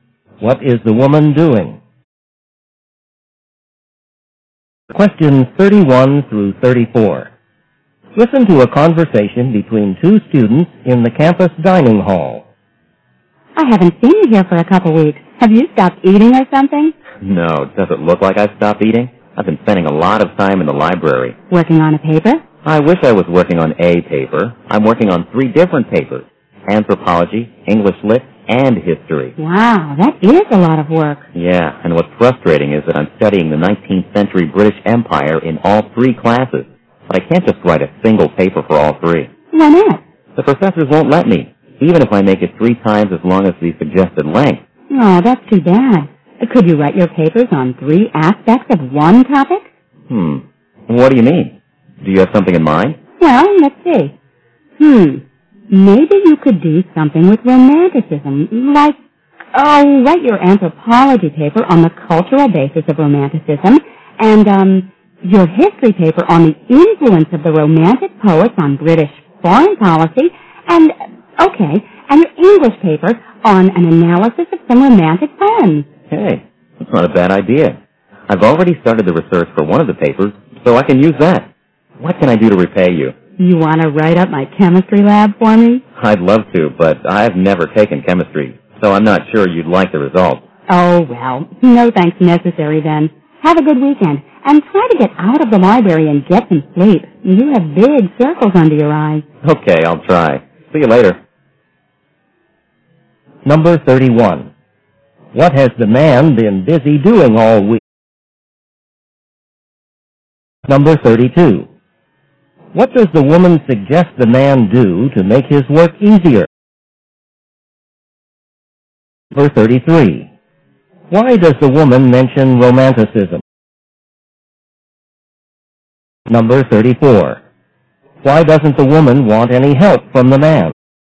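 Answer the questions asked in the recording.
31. Working on three papers in the library
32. Write his papers on three aspects of one topic
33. As an example of a topic that could be used for all three papers
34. He has never taken chemistry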